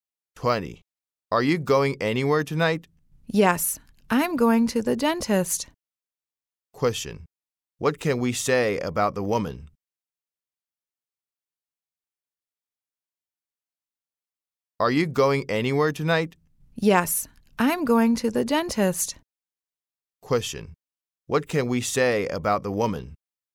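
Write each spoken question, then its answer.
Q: Question: What can we say about the woman?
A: She is going to the dentist tonight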